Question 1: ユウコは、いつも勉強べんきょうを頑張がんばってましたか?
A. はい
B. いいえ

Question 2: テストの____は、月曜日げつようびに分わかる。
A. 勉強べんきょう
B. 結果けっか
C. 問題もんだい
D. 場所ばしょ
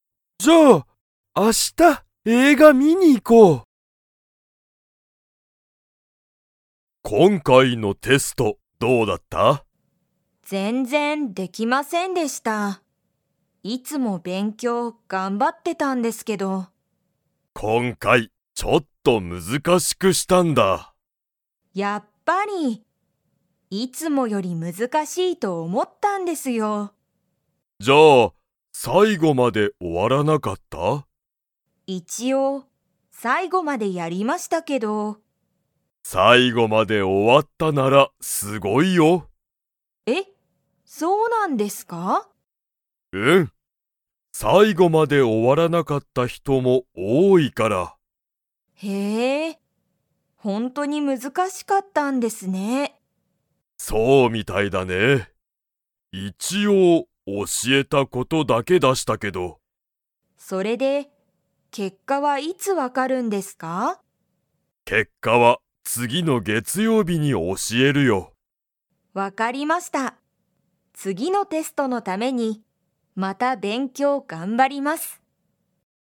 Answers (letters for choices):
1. A
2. B

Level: Level 2